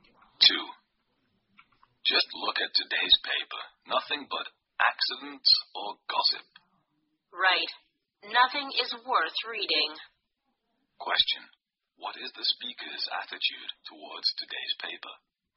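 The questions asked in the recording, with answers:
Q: What is the speaker's attitude towards today's paper?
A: Critical; nothing in it is worth reading.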